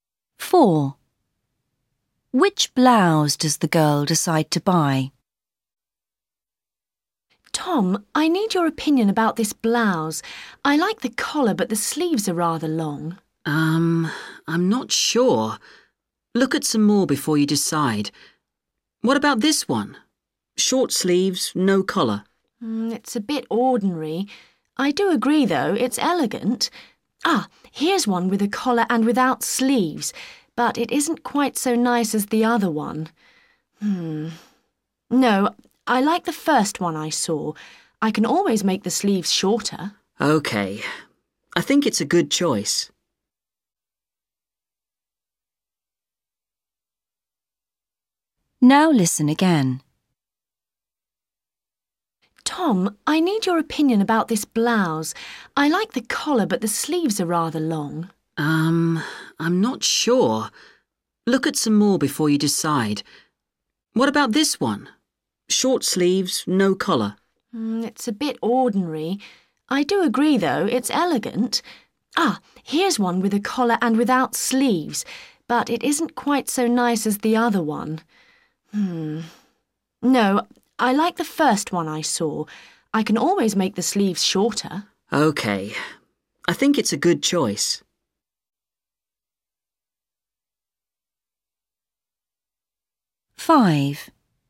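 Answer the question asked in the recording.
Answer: The one with a collar and long sleeves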